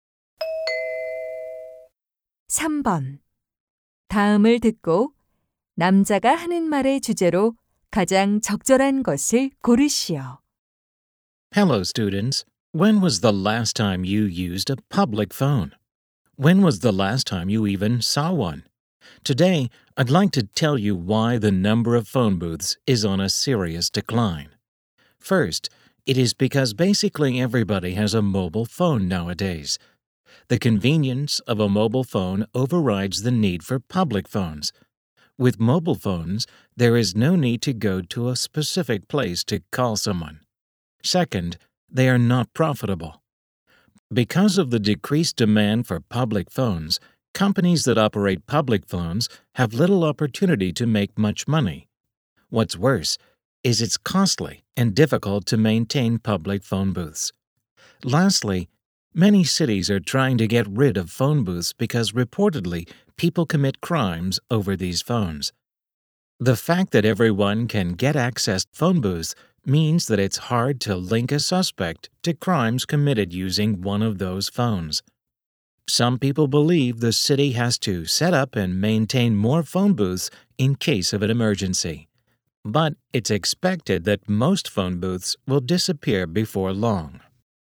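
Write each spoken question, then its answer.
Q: 다음을 듣고 남자가 하는 말의 주제로 가장 적절한 것을 고르시오.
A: 공중전화 부스가 줄어드는 이유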